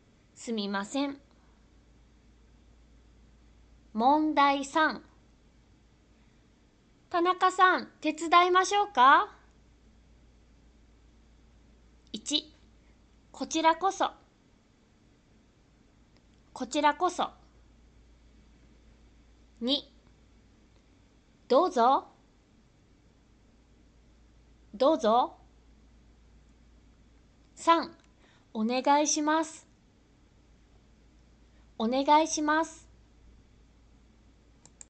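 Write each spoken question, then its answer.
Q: 田中さん、手伝いましょうか?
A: 3: お願いします。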